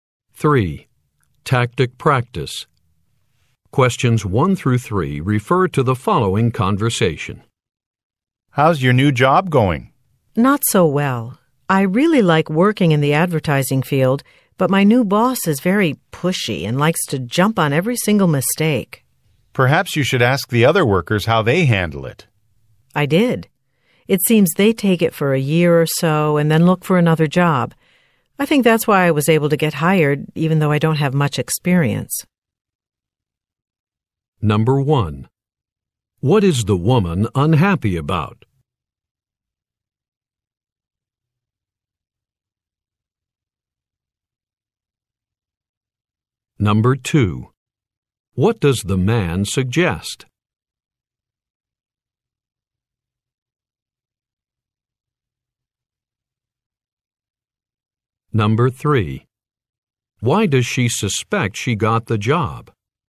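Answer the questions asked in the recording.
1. Her new boss is pushy and jumps on every mistake
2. Asking the other workers how they handle it
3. Workers often leave after about a year, so they needed someone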